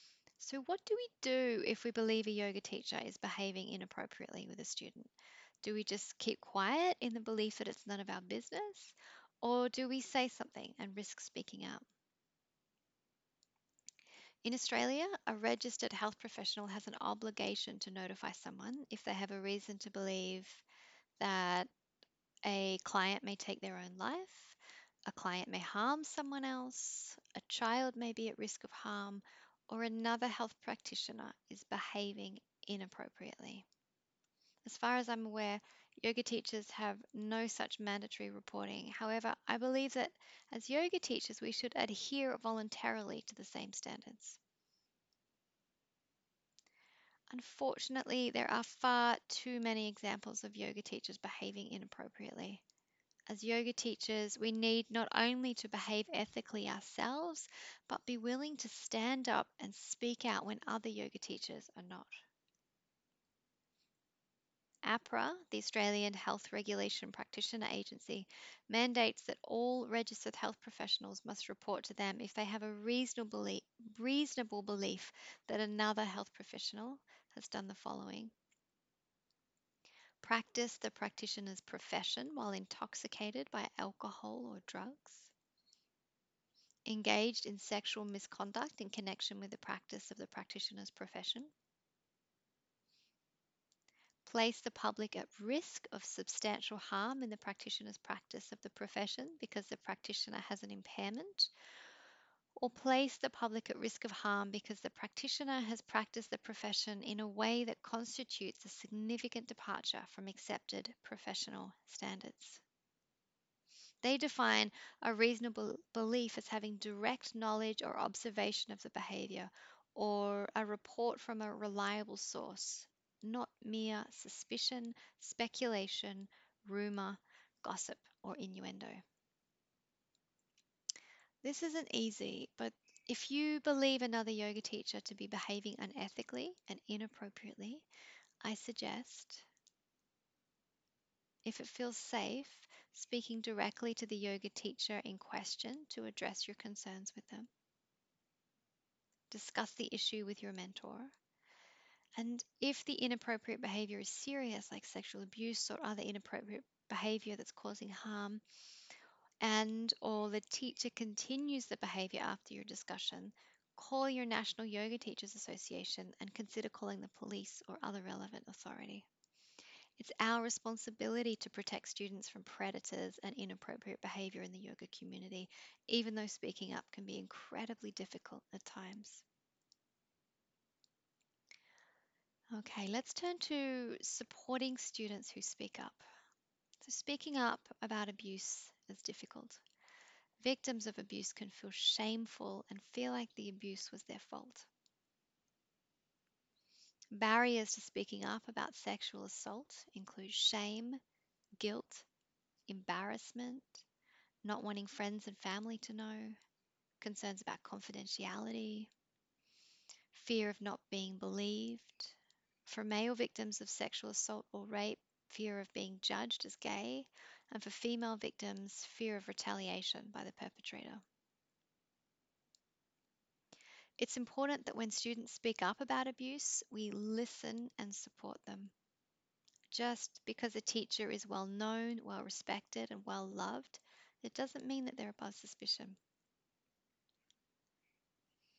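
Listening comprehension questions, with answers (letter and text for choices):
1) Why do people sometimes find it difficult to speak out when they've been sexually abused?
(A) Shame and guilt.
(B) Embarrassment.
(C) Fear of not being believed.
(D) All of the above.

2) If you see or hear about a Yoga Teacher being sexually inappropriate with a student, what would be an appropriate response?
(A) Say nothing, it's none of your business.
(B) Say nothing, it would be too confronting to speak up, and you might be ostracised from your community if you do.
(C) Speak up, we all have a role to play in preventing sexual abuse in our community.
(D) None of the above.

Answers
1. (D) All of the above.
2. (C) Speak up, we all have a role to play in preventing sexual abuse in our community.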